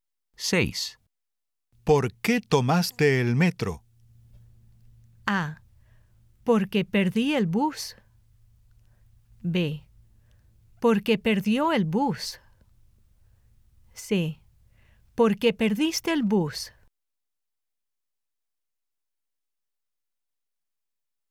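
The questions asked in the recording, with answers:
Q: ¿Por qué tomaste el metro?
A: A: Porque perdí el bus.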